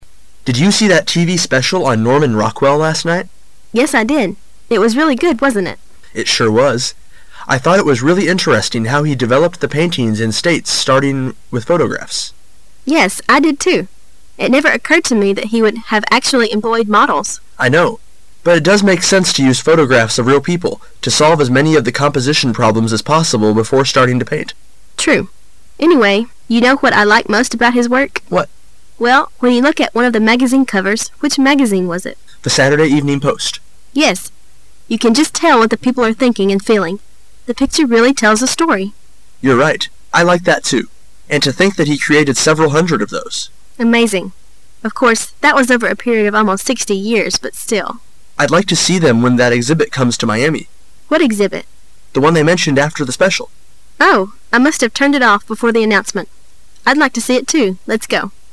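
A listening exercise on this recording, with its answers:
Questions 5 to 7 are based on the following conversation. At the end of the conversation, you will be given 15 seconds to answer the questions. Now listen to the conversation.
What can we learn about Norman Rockwell from the conversation?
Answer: He created several hundred magazine covers for The Saturday Evening Post over almost 60 years.

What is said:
[解析] 5-7 M: Did you see that TV special on Norman Rockwell last night? W: Yes, I did. It was really good, wasn't it? M: It sure was. I thought it was really interesting how he developed the paintings in states starting with photo- graphs. It never occurred to me that he would have actually employed models. M: I know. But it does make sense to use photographs of real people, to solve as many of the composition problems as possible before starting to paint. W: True. Anyway, you know what I like most about his work? 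M: What? W: Well, when you look at one of the magazine covers, which magazine was it? M: The Saturday Evening Post. W: Yes, you can just tell what the people are thinking and feeling. The picture really tells a story. M: You're right. I like that, too. And to think that he created several hundred of those. W: Amazing. Of course, that was over a period of almost sixty years, but still... M: I'd like to see them when that exhibit comes to Miami. W: What exhibit? M: The one they mentioned after the special.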